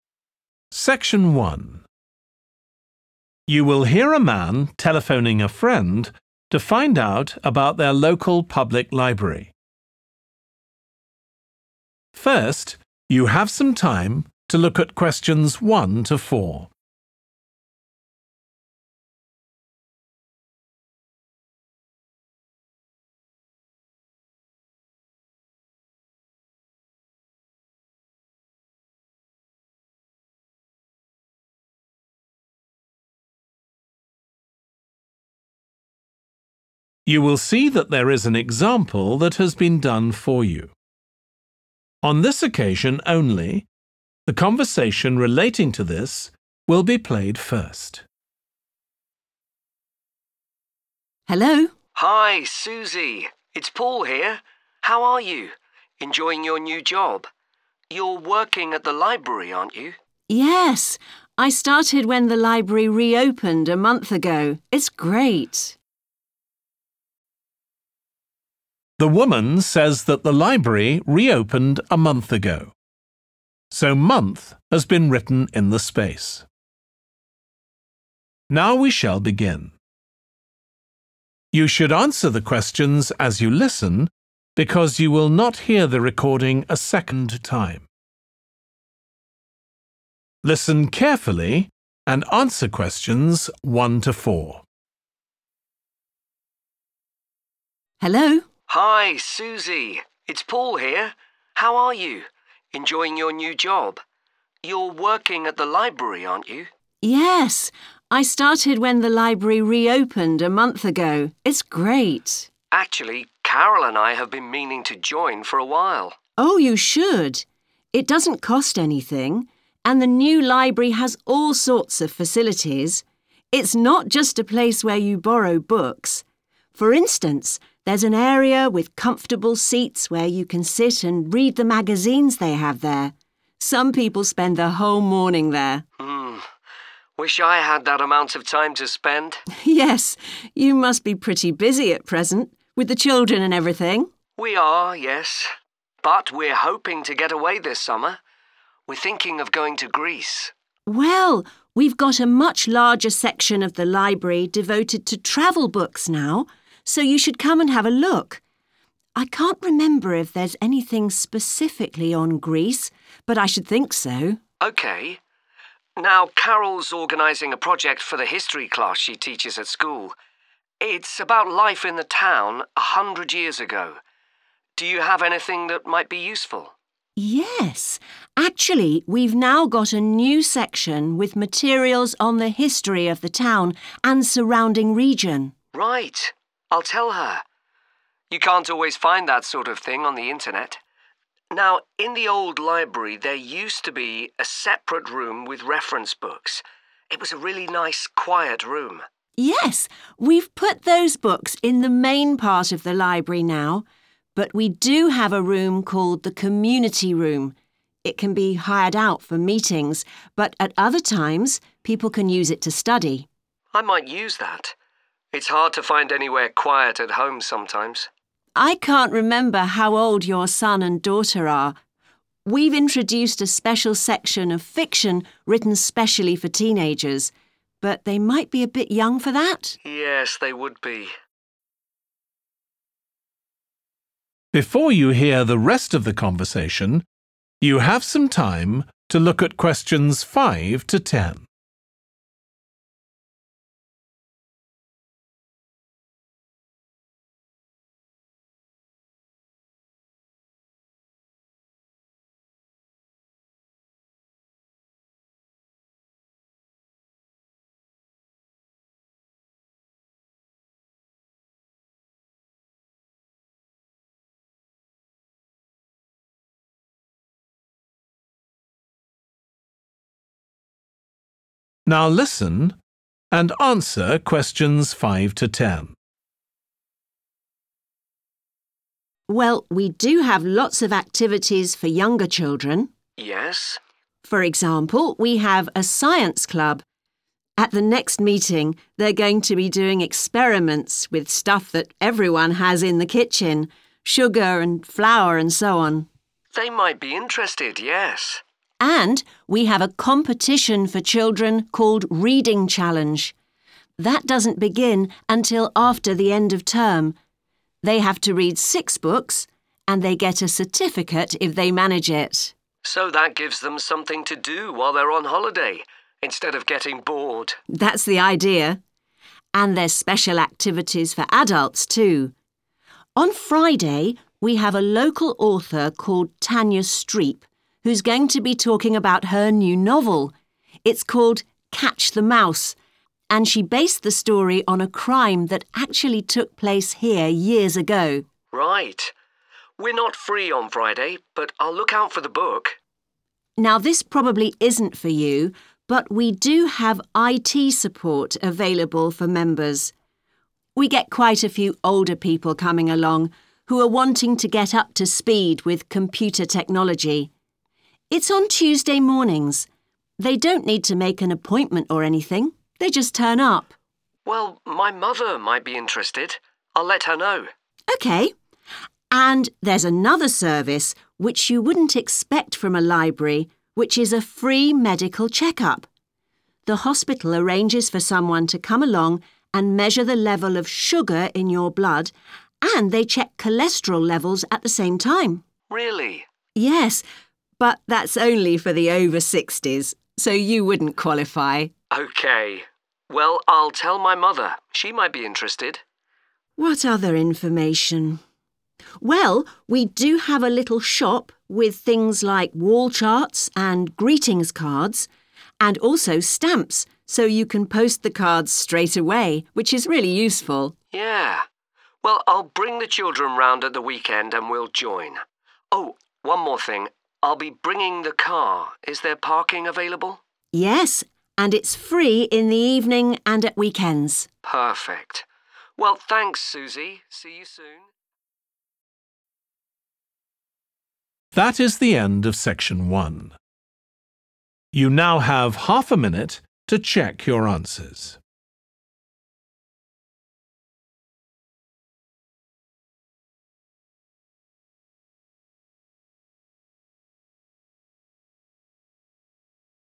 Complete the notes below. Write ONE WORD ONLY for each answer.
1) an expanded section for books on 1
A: travel / traveling / travelling

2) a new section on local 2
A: history

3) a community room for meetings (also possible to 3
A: study

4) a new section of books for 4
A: teenagers

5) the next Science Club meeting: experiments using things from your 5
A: kitchen

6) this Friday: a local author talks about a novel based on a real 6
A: crime

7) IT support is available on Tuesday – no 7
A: appointment / booking

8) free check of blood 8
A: sugar

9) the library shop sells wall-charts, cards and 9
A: stamps

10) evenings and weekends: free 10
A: parking

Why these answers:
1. The correct answer 'travel' is correct because it directly corresponds to the subject of the excerpt, which is about books related to traveling in the library. 'Traveling' and 'travelling' are also acceptable as they are variations of the same word.
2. The correct answer is 'history' because it accurately reflects the type of information provided in the excerpt about the new section in the library dedicated to the history of the town and surrounding region.
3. The correct answer is 'study' because the community room can be used for studying when it is not being rented for meetings.
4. The correct answer is 'teenagers' because the excerpt states that a section of fiction was created for this age group, indicating that the library has content tailored to teenagers, making it more engaging for them.
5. The correct answer is 'kitchen' because the transcript specifically mentions that the experiments at the Science Club meeting will use things from the kitchen.
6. The correct answer is 'crime' because the excerpt mentions that the novel is based on a crime, which means the story comes from a real illegal event that took place before.
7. The correct answer is 'booking' because in the excerpt, it is mentioned that 'they don't need to make an appointment or anything', implying that no prior arrangement is needed. Therefore, 'booking' is the correct answer because it is not necessary for the IT support service.
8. The correct answer is 'sugar' because the transcript specifically mentions that the check-up includes measuring the level of sugar in your blood.
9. The correct answer is 'stamps' because the transcript clearly says that the shop has stamps for sale among other items.
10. The correct answer is 'parking' because it directly responds to the question about whether there is an area available for cars at the library.

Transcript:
SUSIE: Hello?
PAUL: Hi, Susie, it's Paul here. How are you? Enjoying your new job? You're working at the library, aren't you?
SUSIE: Yes. I started when the library re-opened a month ago. It's great.
PAUL: Actually Carol and I have been meaning to join for a while.
SUSIE: Oh, you should. It doesn't cost anything, and the new library has all sorts of facilities. It's not just a place where you borrow books. For instance, there's an area with comfortable seats where you can sit and read the magazines they have there. Some people spend the whole morning there.
PAUL: Mmm. Wish I had that amount of time to spend!
SUSIE: Yes, you must be pretty busy at present, with the children and everything?
PAUL: We are, yes. But we're hoping to get away this summer. We're thinking of going to Greece.
SUSIE: Well, we've got a much larger section of the library devoted to travel books now, so you should come and have a look. I can't remember if there's anything specifically on Greece, but I should think so.
PAUL: OK. Now Carol's organising a project for the history class she teaches at school – it's about life in the town a hundred years ago. Do you have anything that might be useful?
SUSIE: Yes, actually we've now got a new section with materials on the history of the town and surrounding region.
PAUL: Right. I'll tell her. You can't always find that sort of thing on the internet. Now in the old library there used to be a separate room with reference books. It was a really nice quiet room.
SUSIE: Yes. We've put those books in the main part of the library now, but we do have a room called the community room. It can be hired out for meetings, but at other times people can use it to study.
PAUL: I might use that. It's hard to find anywhere quiet at home sometimes.
SUSIE: I can't remember how old your son and daughter are ... we've introduced a special section of fiction written specially for teenagers, but they might be a bit young for that?
PAUL: Yes, they would be.
SUSIE: Well, we do have lots of activities for younger children.
PAUL: Yes?
SUSIE: For example we have a Science Club. At the next meeting, they're going to be doing experiments with stuff that everyone has in the kitchen – sugar and flour and so on.
PAUL: They might be interested, yes.
SUSIE: And we have a competition for children called Reading Challenge. That doesn't begin until after the end of term. They have to read six books, and they get a certificate if they manage it.
PAUL: So that gives them something to do while they're on holiday, instead of getting bored.
SUSIE: That's the idea. And there's special activities for adults too. On Friday we have a local author called Tanya Streep who's going to be talking about her new novel. It's called 'Catch the Mouse' and she based the story on a crime that actually took place here years ago.
PAUL: Right. We're not free on Friday, but I'll took out for the book.
SUSIE: Now this probably isn't for you, but we do have IT support available for members. We get quite a few older people coming along who are wanting to get up to speed with computer technology. It's on Tuesday mornings – they don't need to make an appointment or anything, they just turn up.
PAUL: Well, my mother might be interested, I'll let her know.
SUSIE: OK. And there's another service which you wouldn't expect from a library, which is a free medical check-up. The hospital arranges for someone to come along and measure the level of sugar in your blood, and they check cholesterol levels at the same time.
PAUL: Really?
SUSIE: Yes, but that's only for the over-60s, so you wouldn't qualify.
PAUL: OK. Well, I'll tell my mother, she might be interested.
SUSIE: What other information ... well, we do have a little shop with things like wallcharts and greetings cards, and also stamps so you can post the cards straightaway, which is really useful.
PAUL: Yeah. Well, I'll bring the children round at the weekend and we'll join. Oh, one more thing – I'll be bringing the car, is there parking available?
SUSIE: Yes, and it's free in the evening and at weekends.
PAUL: Perfect. Well, thanks, Susie see you ...